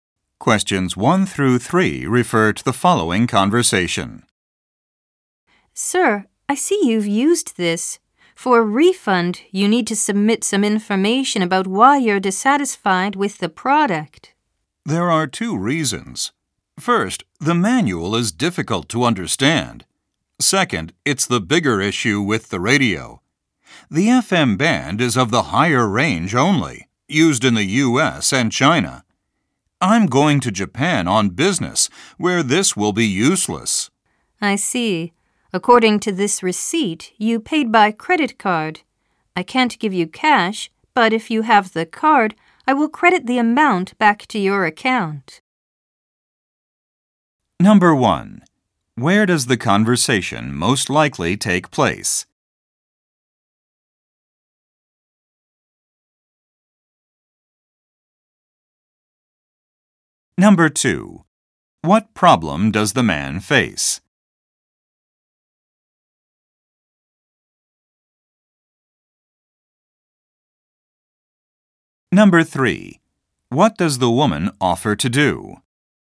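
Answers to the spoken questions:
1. In a store, at the returns or customer service desk
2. The radio's FM band won't work in Japan, where he is going
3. Credit the amount back to his credit card account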